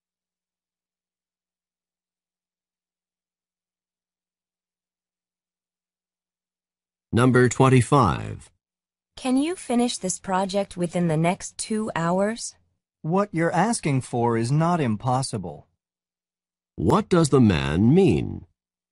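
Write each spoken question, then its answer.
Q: What does the man mean?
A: He can possibly finish it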